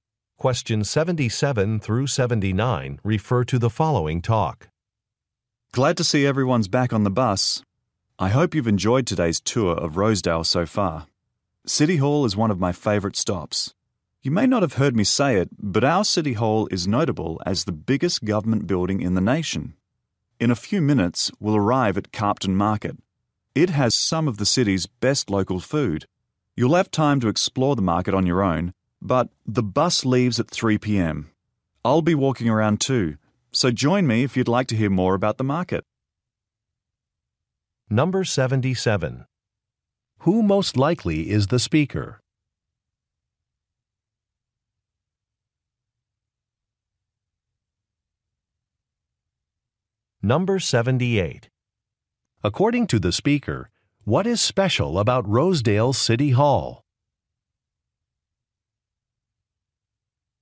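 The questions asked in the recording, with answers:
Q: Who most likely is the speaker?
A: A tour guide

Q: According to the speaker, what is special about Rosedale City Hall?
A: It is the biggest government building in the nation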